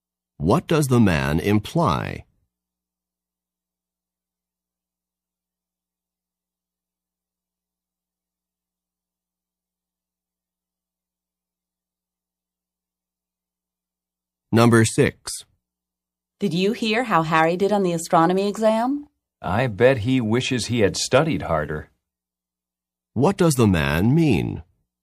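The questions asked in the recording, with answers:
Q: What does the man mean?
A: Harry didn't study hard enough and did poorly.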